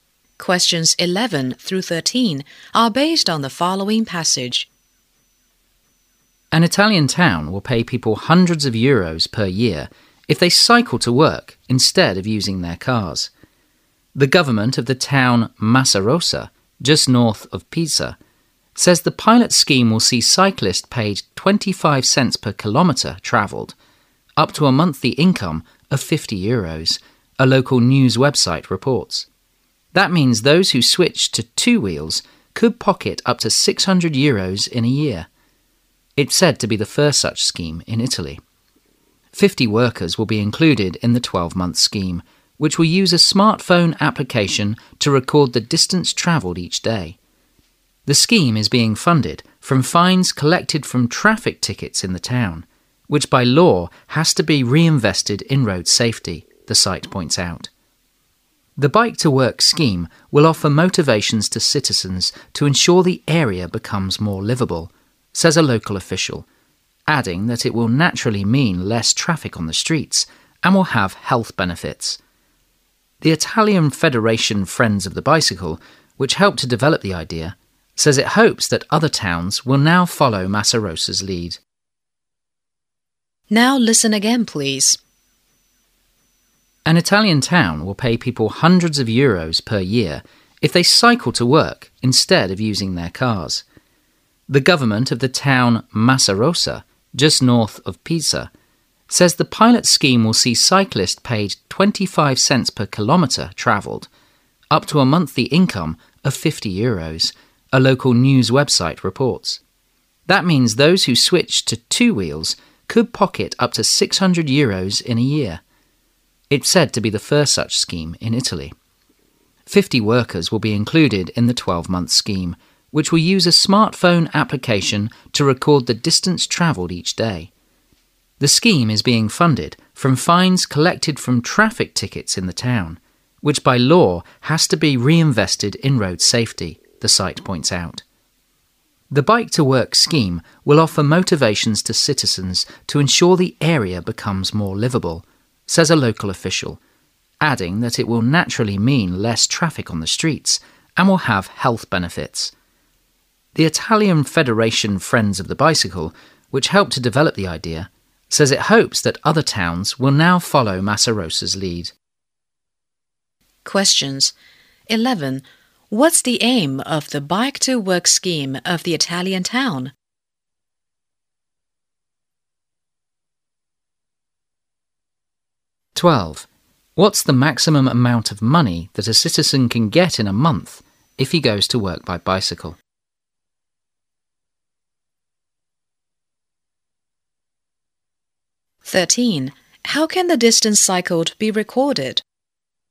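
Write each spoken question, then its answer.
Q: What's the maximum amount of money that a citizen can get in a month if he goes to work by bicycle?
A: 50 euros

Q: How can the distance cycled be recorded?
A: By a smartphone application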